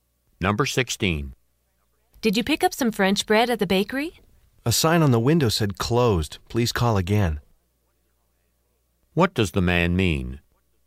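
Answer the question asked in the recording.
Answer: The bakery was closed, so he didn't get bread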